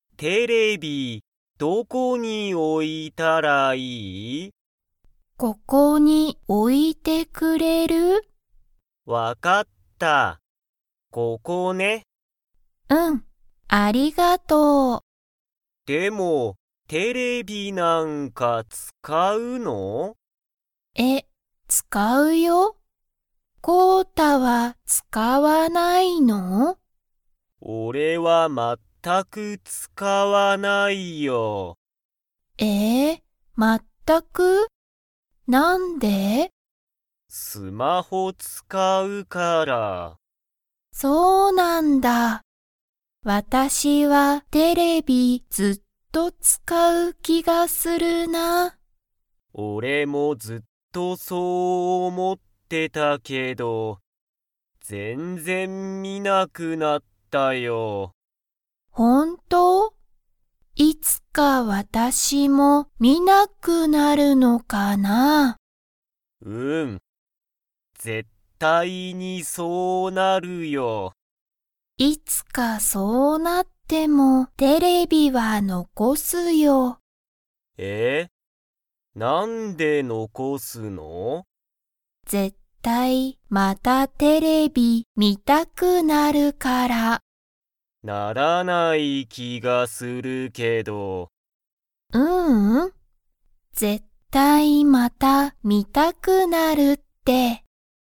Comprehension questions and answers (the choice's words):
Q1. コウタは、テレビを使(つか)いますか?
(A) はい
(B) いいえ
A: いいえ

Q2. マリは、____またテレビが観(み)たくなると思(おも)う。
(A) 一緒(いっしょ)に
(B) よく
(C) 一人(ひとり)で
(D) 絶対(ぜったい)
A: 絶対(ぜったい)

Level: Level 2